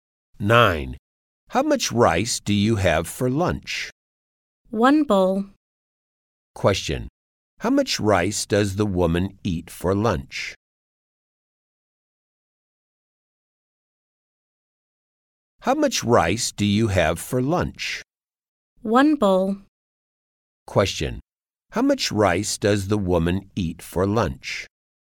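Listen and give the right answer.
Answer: One bowl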